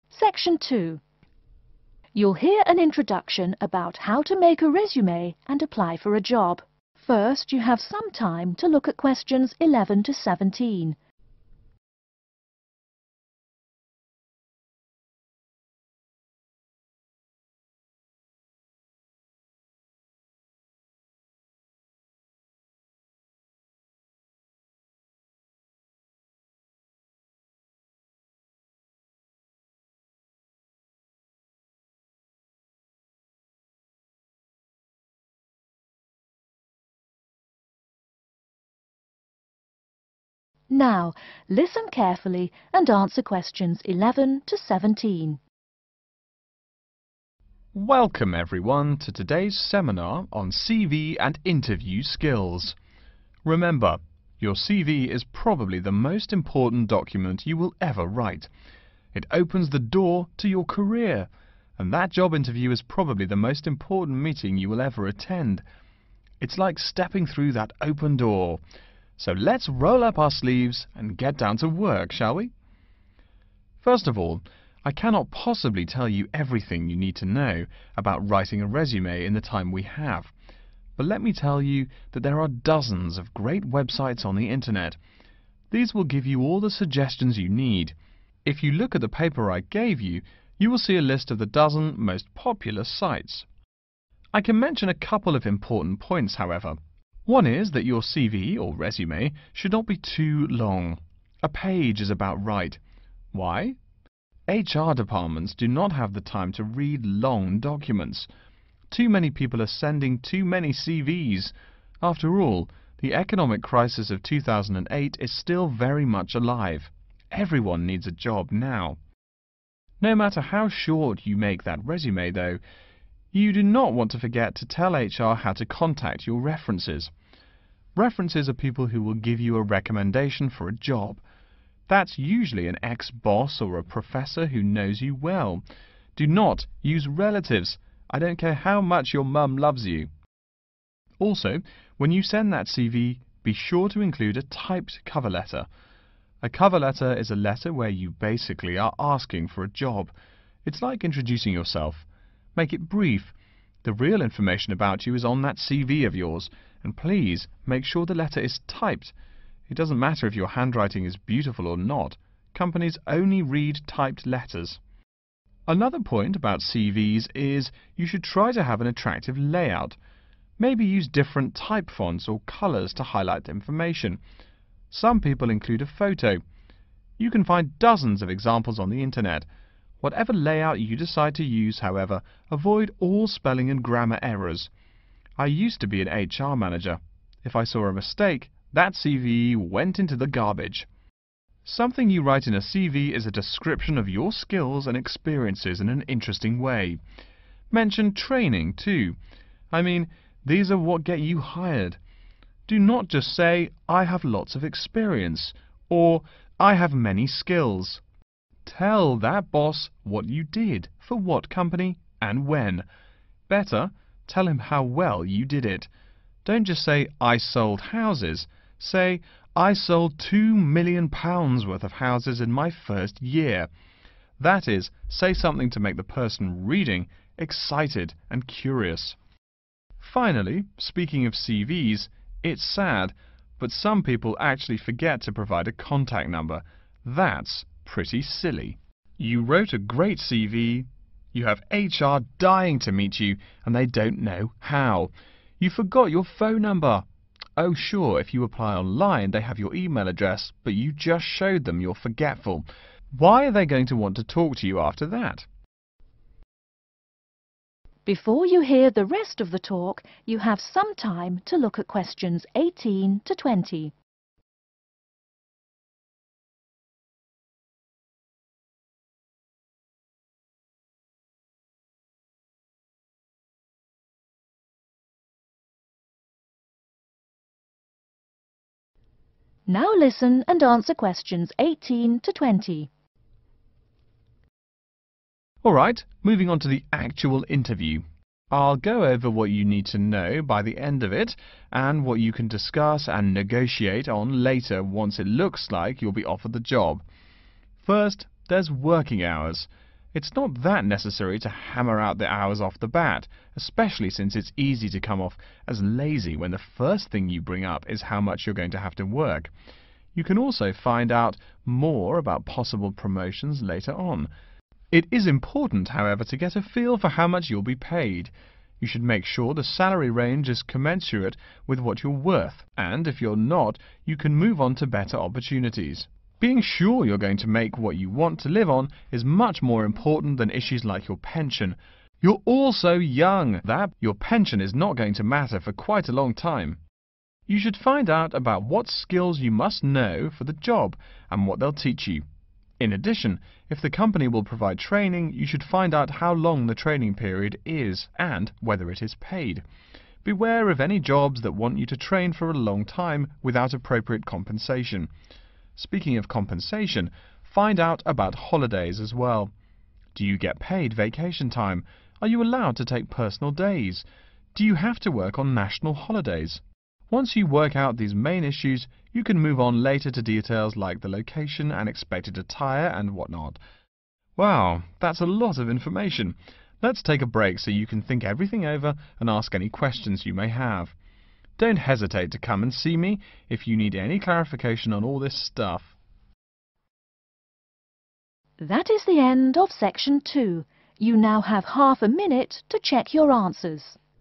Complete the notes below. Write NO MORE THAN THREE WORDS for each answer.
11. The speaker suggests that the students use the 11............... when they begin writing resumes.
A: Internet

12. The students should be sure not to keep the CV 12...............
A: too long

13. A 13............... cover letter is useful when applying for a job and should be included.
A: typed

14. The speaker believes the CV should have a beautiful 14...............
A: layout

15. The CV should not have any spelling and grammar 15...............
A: errors

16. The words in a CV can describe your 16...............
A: skills and experiences

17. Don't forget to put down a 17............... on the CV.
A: contact number